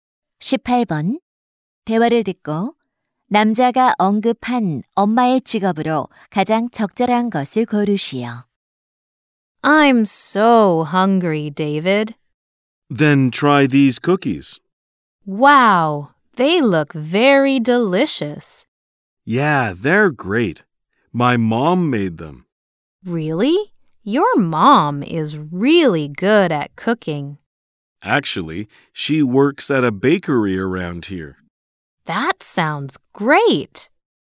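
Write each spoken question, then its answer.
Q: 대화를 듣고 남자가 언급한 엄마의 직업으로 가장 적절한 것을 고르시오.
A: 제빵사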